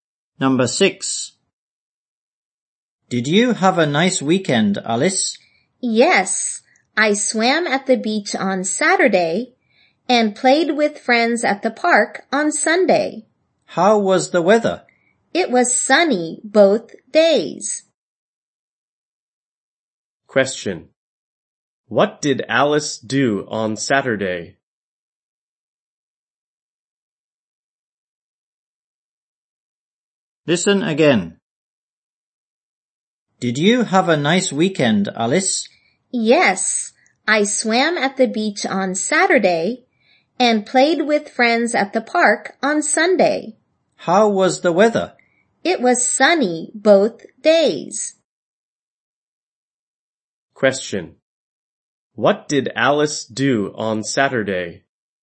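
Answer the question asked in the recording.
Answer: She swam at the beach.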